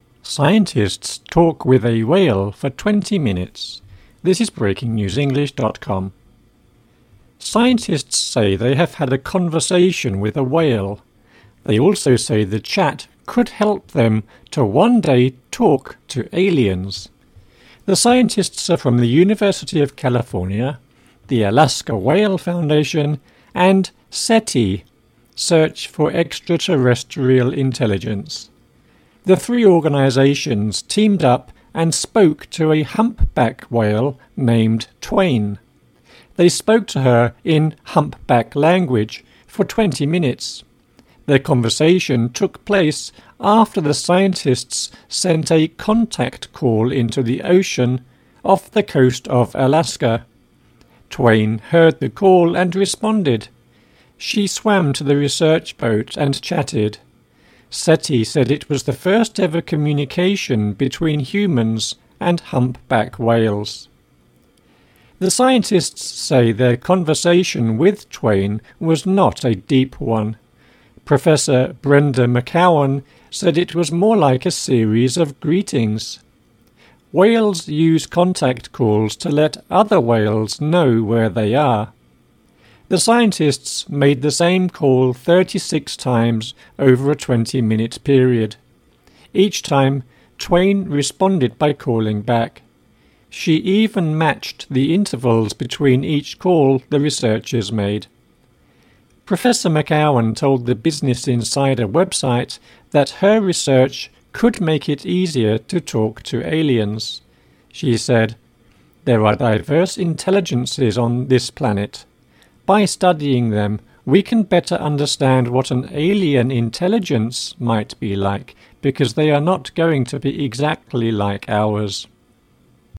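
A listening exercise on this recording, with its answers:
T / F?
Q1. The scientists in the article hope to chat to aliens one day.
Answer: T

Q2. The scientists spoke to a blue whale.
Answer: F

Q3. The scientists and the whale communicated in a giant pool.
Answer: F

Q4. This is the second time scientists have chatted to a humpback whale.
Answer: F

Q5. The whale responded to 36 calls the scientists made in the water.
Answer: T

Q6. The whale matched the intervals of the scientists' calls.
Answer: T

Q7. A scientist said our intelligence is the same as alien intelligence.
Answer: F

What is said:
Scientists 'talk' with a whale for 20 minutes
Scientists say they have had a "conversation" with a whale. They also say the chat could help them to one day talk to aliens. The scientists are from the University of California, the Alaska Whale Foundation, and SETI (Search for Extra-terrestrial Intelligence). 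The three organizations teamed up and spoke to a humpback whale named Twain. They spoke to her in "humpback language" for 20 minutes. Their conversation took place after the scientists sent a "contact call" into the ocean off the coast of Alaska. Twain heard the call and responded. She swam to the research boat and chatted. SETI said it was the first ever communication between humans and humpback whales.
The scientists say their conversation with Twain was not a deep one. Professor Brenda McCowan said it was more like a series of greetings. Whales use contact calls to let other whales know where they are. The scientists made the same call 36 times over a 20-minute period. Each time, Twain responded by calling back. She even matched the intervals between each call the researchers made. Professor McCowan told the Business Insider website that her research could make it easier to talk to aliens. 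She said: "There are diverse intelligences on this planet. By studying them, we can better understand what an alien intelligence might be like because they are not going to be exactly like ours."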